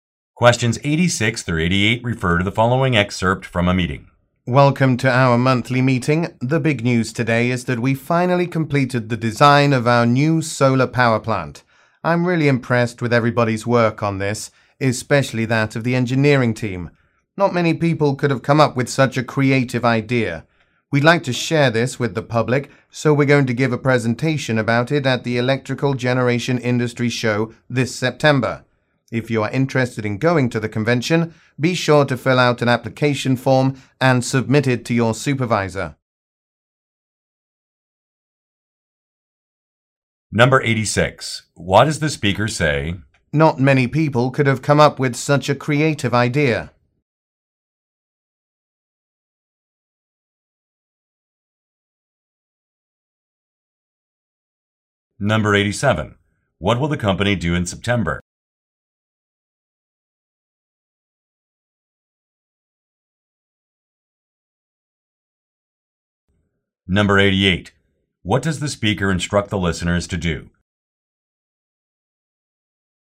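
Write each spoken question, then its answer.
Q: What will the company do in September?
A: Give a presentation at the Electrical Generation Industry Show

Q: What does the speaker instruct the listeners to do?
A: Fill out an application form and submit it to their supervisor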